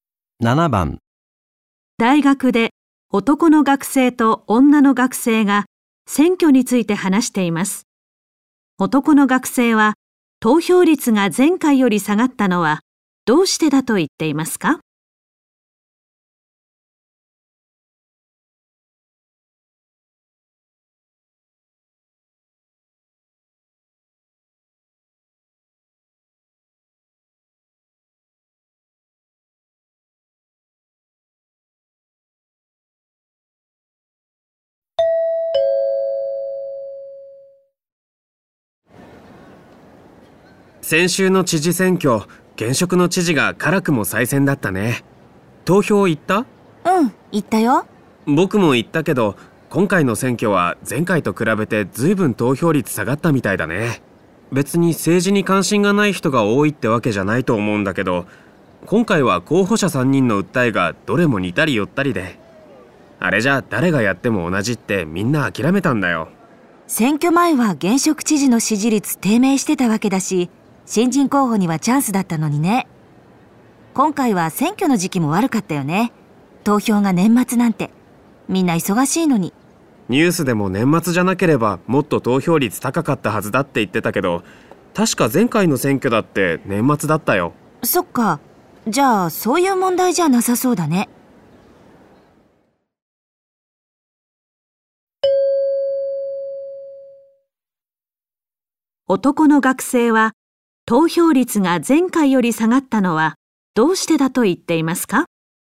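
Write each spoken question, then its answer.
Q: 男の学生は投票率が前回より下がったのはどうしてだと言っていますか?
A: 3人の候補者の訴えが似ていて、誰がやっても同じだと諦めたから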